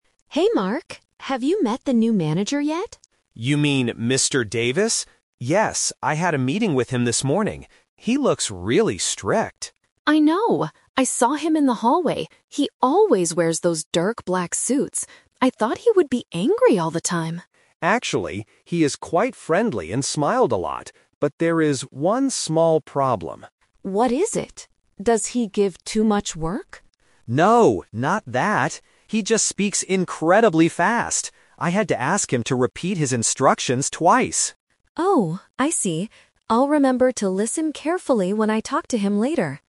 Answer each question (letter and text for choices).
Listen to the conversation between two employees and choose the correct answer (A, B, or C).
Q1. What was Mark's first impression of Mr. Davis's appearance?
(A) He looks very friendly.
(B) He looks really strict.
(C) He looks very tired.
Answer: (B) He looks really strict.

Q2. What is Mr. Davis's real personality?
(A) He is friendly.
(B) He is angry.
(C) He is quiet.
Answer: (A) He is friendly.

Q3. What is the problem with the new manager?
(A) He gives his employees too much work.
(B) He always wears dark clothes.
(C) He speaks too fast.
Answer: (C) He speaks too fast.

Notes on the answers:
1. Mark clearly says, "He looks really strict." The Trap: Option (A) is a trap because Mr. Davis is friendly in reality, but his appearance (looks) made him seem strict.
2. Mark uses the "Twist" technique here. He says, "Actually, he is quite friendly and smiled a lot." The Trap: Option (B) is a trap. Emma says "I thought he would be angry," which is just her guess based on his black suits, not his real personality.
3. Mark states the real problem: "He just speaks incredibly fast!" The Trap: Option (A) is a trap because Emma asks, "Does he give too much work?", but Mark rejects this by saying, "No, not that." Option (B) is a fact about his clothes, but it is not the "problem" they are discussing.

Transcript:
Emma: Hey Mark, have you met the new manager yet?
Mark: You mean Mr. Davis? Yes, I had a meeting with him this morning.
Emma: I know! I saw him in the hallway. He always wears those dark black suits. I thought he would be angry all the time.
Mark: Actually, he is quite friendly and smiled a lot. But there is one small problem...
Emma: What is it? Does he give too much work?
Mark: No, not that. He just speaks incredibly fast! I had to ask him to repeat his instructions twice.